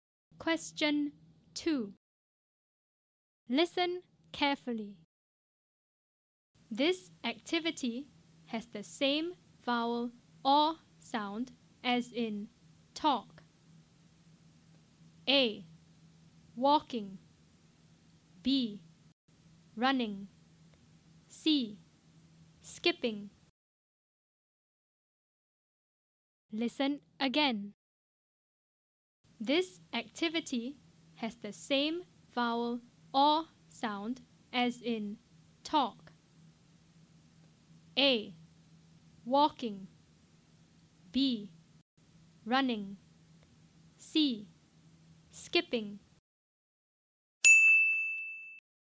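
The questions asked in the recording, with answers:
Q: This activity has the same vowel or sound as in talk.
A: A: Walking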